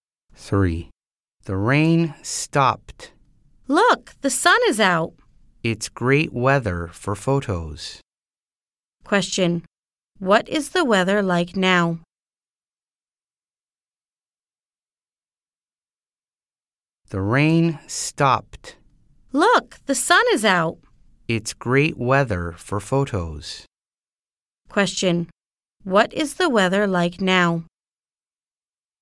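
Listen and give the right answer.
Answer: It's sunny.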